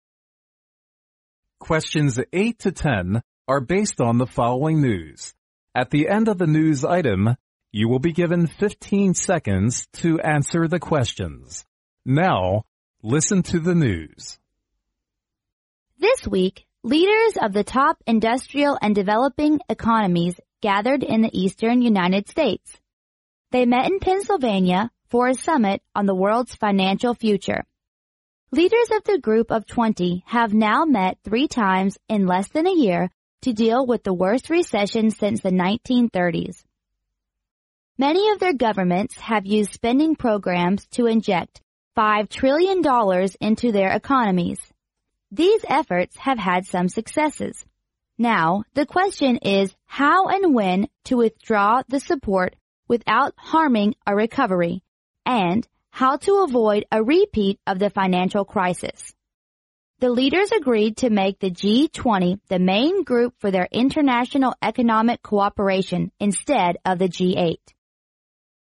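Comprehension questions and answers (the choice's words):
Now listen to the news.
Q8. What is the news item mainly about?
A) Top industrial countries met in the US for world finance.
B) Developing economies met in the US for a summit on finance.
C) G20 leaders met in the US for a summit on future world finance.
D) Developing and industrial economies met in the US for a summit on finance.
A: G20 leaders met in the US for a summit on future world finance.

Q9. Many of G20 governments have used spending programs to inject _____ dollars into their economies.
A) 5 billion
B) 50 billion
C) 500 billion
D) 5,000 billion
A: 5,000 billion

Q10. Which is NOT a problem for those governments which have injected huge money to their economy?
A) When to avoid a repeat of the financial crisis.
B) When to withdraw that support without harming a recovery.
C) How to withdraw that support without harming a recovery.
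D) How to avoid a repeat of the financial crisis.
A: When to avoid a repeat of the financial crisis.

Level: 专业四级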